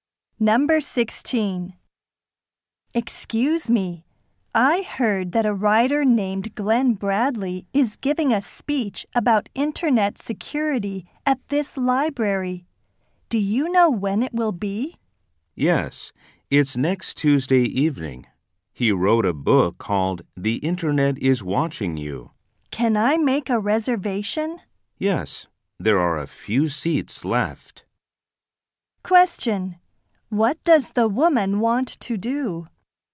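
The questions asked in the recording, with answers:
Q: What does the woman want to do?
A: Reserve a seat for Glenn Bradley's talk on internet security.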